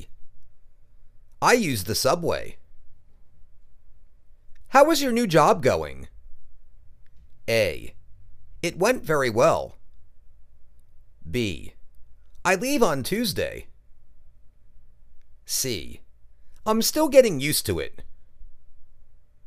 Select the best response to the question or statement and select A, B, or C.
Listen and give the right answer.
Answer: I'm still getting used to it.